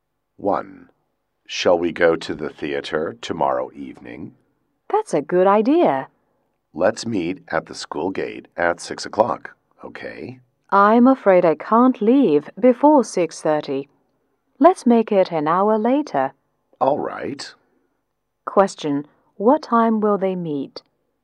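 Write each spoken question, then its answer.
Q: what time will they meet?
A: At 7 o'clock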